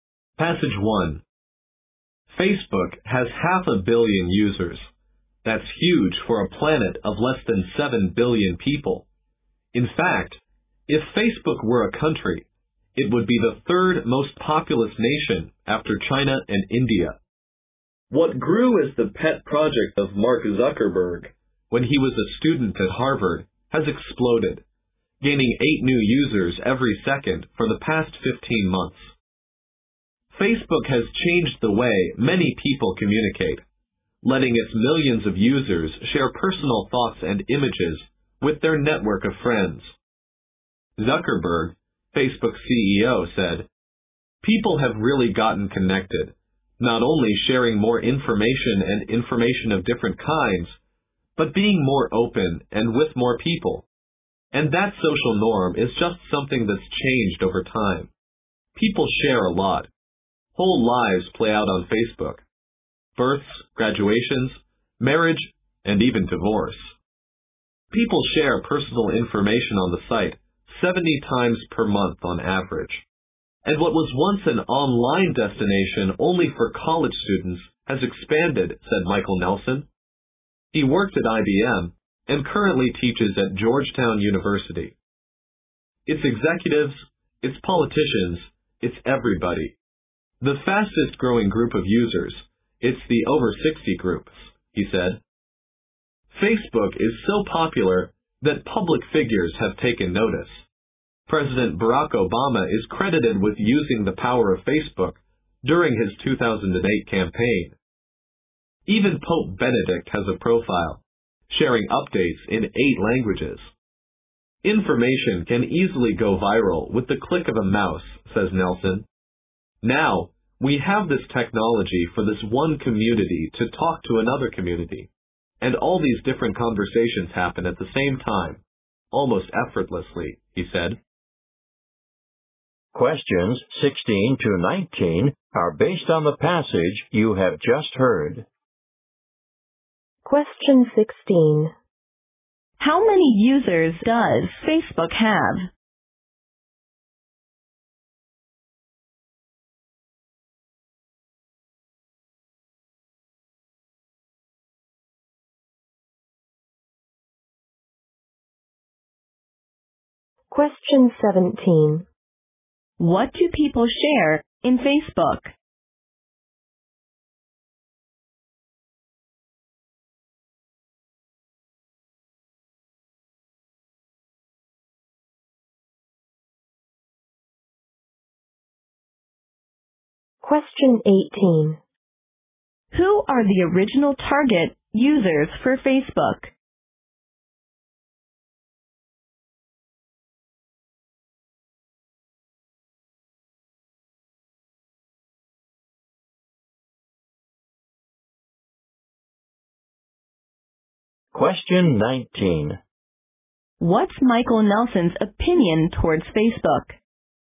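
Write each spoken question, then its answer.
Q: How many users does Facebook have?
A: 500 million

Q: What do people share in Facebook?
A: Personal thoughts, images and life events

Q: Who are the original target users for Facebook?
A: College students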